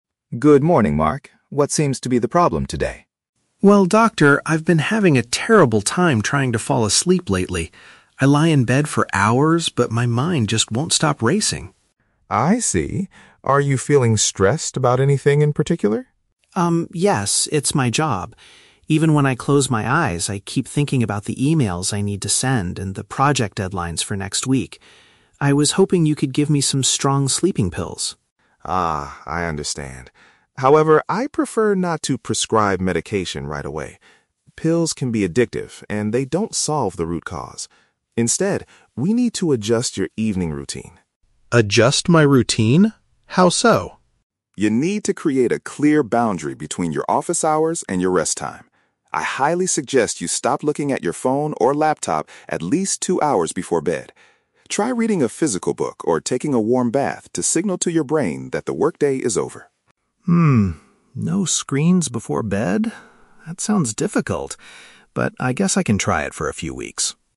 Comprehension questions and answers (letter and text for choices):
Listen to the medical consultation between a doctor and a patient (Mark), and choose the correct answer (A, B, or C).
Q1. Why is Mark visiting the clinic today?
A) He needs a medical certificate to take a break from work.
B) He is struggling to get enough rest due to professional worries.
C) He wants the doctor to cure his terrible headache with strong pills.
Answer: B) He is struggling to get enough rest due to professional worries.

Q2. What did Mark originally expect the doctor to do for him?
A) To give him a prescription for medication.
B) To help him extend his project deadlines for the following week.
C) To suggest an interesting physical book for him to read at night.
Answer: A) To give him a prescription for medication.

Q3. What lifestyle change does the doctor recommend?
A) Taking a warm bath as soon as he leaves the office.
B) Drinking a cup of warm tea to calm his racing mind.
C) Staying away from digital displays a couple of hours before sleeping.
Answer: C) Staying away from digital displays a couple of hours before sleeping.

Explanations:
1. Mark says he has a "terrible time trying to fall asleep" (struggling to get enough rest) because his mind keeps thinking about his "job," "emails," and "deadlines" (professional worries).
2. Mark explicitly says, "I was hoping you could give me some strong sleeping pills." "Prescription for medication" is a paraphrase for giving sleeping pills.

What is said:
Doctor: Good morning, Mark. What seems to be the problem today?
Mark: Well, doctor, I've been having a terrible time trying to fall asleep lately. I lie in bed for hours, but my mind just won't stop racing.
Doctor: I see. Are you feeling stressed about anything in particular?
It's my job. Even when I close my eyes, I keep thinking about the emails I need to send and the project deadlines for next week. I was hoping you could give me some strong sleeping pills.
Doctor: Ah, I understand. However, I prefer not to prescribe medication right away. Pills can be addictive and they don't solve the root cause. Instead, we need to adjust your evening routine.
Mark: Adjust my routine? How so?
Doctor: You need to create a clear boundary between your office hours and your rest time. I highly suggest you stop looking at your phone or laptop at least two hours before bed. Try reading a physical book or taking a warm bath to signal to your brain that the workday is over.
no screens before bed. That sounds difficult, but I guess I can try it for a few weeks.